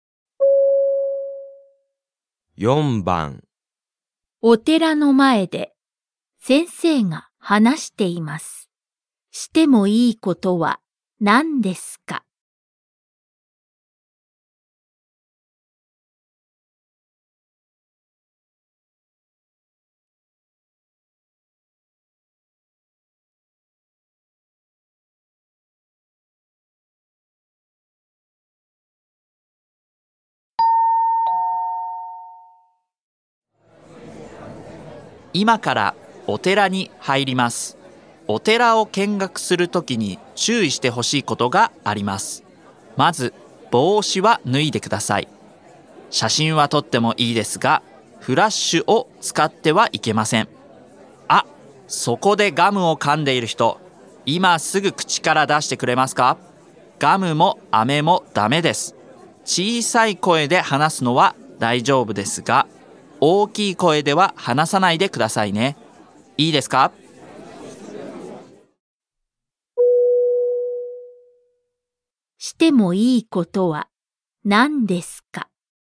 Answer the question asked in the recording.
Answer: 小さい声で話す。